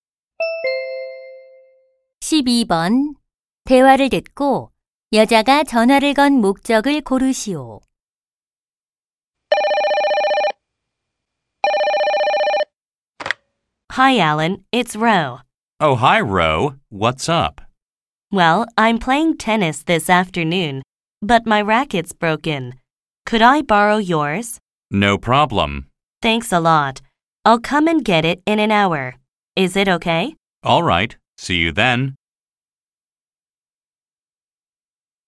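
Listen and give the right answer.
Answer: 테니스 라켓을 빌리려고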